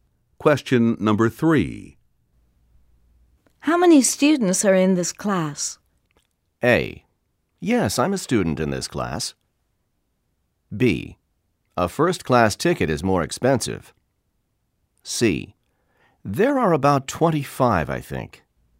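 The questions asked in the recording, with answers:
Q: How many students are in this class?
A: C: There are about 25, I think.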